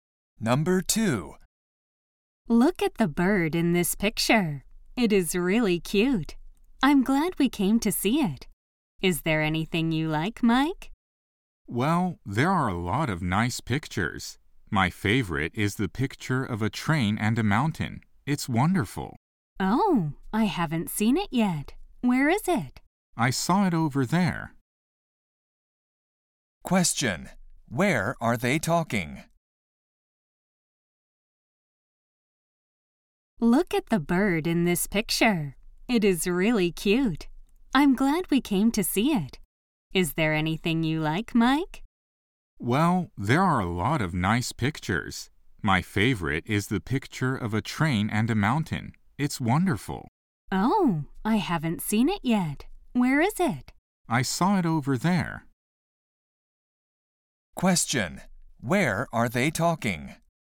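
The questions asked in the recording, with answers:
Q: Where are they talking?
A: At a museum (art gallery)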